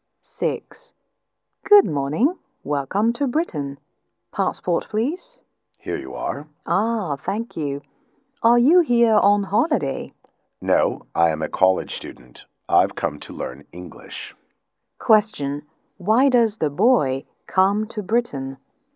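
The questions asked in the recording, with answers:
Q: Why does the boy come to Britain?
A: To learn English.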